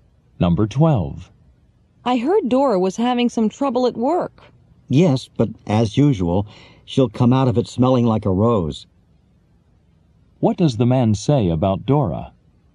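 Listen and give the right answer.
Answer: She'll come through her trouble fine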